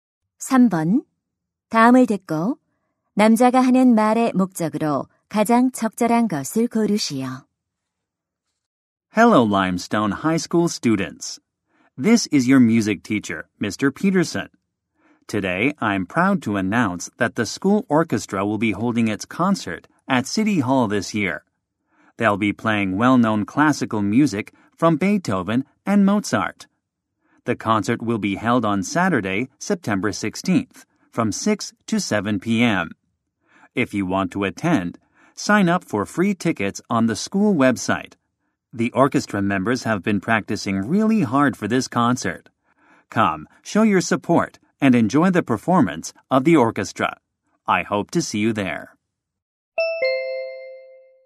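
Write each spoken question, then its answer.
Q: 다음을 듣고 남자가 하는 말의 목적으로 가장 적절한 것을 고르시오.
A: 학교 오케스트라 시청 연주회를 알리고 참석을 독려하려고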